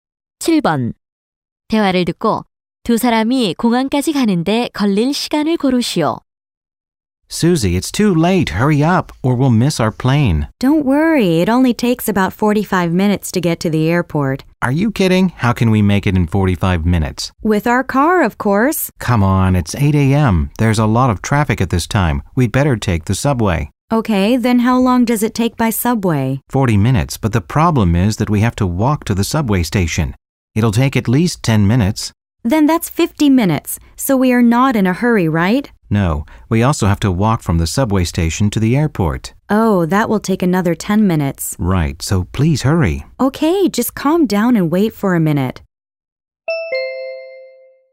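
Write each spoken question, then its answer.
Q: 대화를 듣고 두 사람이 공항까지 가는데 걸릴 시간을 고르시오.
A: 60분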